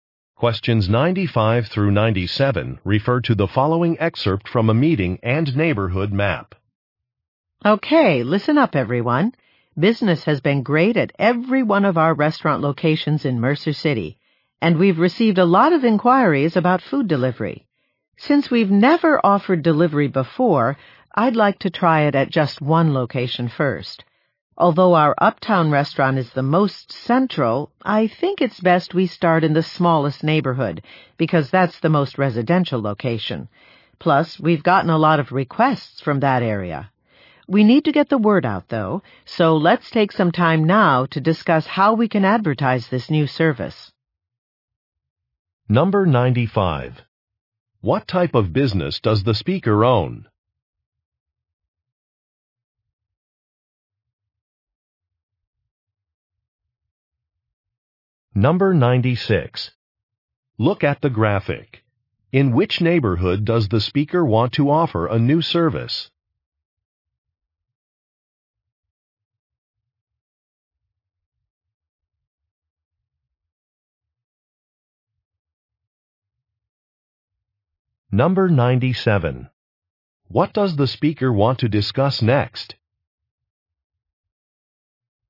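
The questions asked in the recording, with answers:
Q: What type of business does the speaker own?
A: Restaurants

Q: What does the speaker want to discuss next?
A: How to advertise the delivery service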